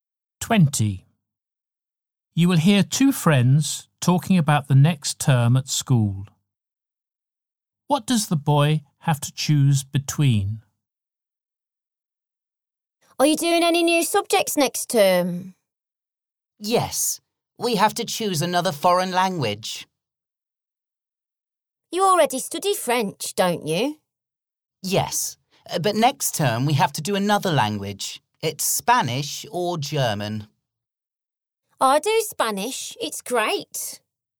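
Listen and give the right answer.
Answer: Spanish or German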